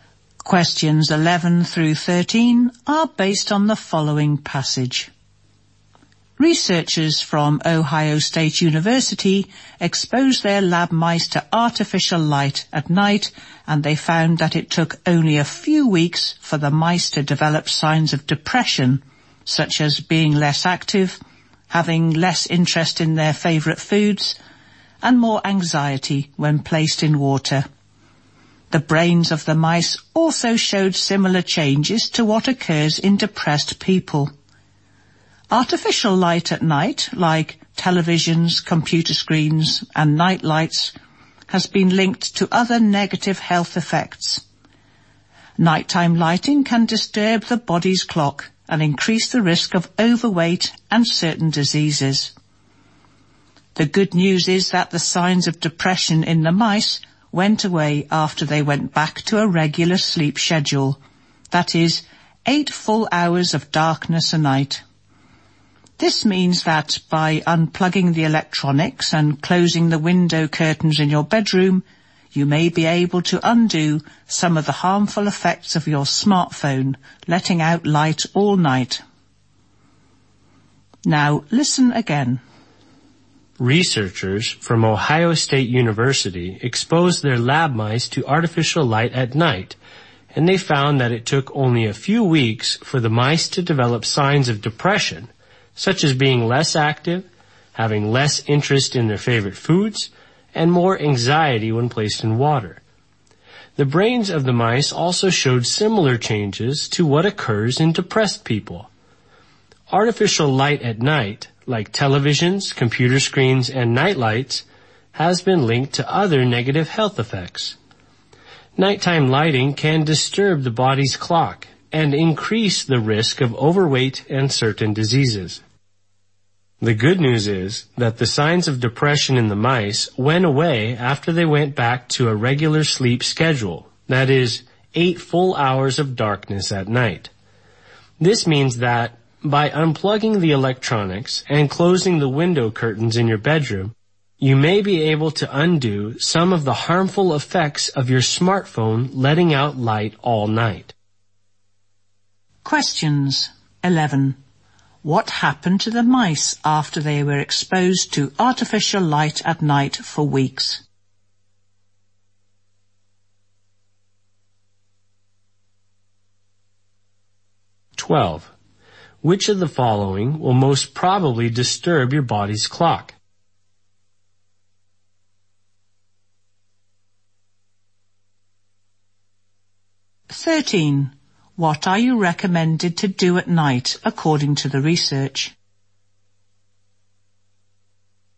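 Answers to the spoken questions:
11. They showed signs of depression
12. Artificial light at night, such as TV or computer screens
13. Unplug electronics and close the curtains to sleep in darkness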